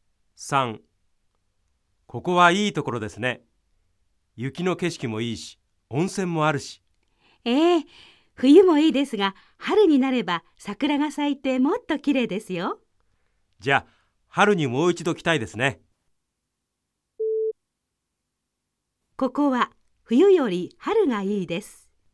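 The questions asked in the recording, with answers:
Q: ここは冬より春がいいです。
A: ○(正しい)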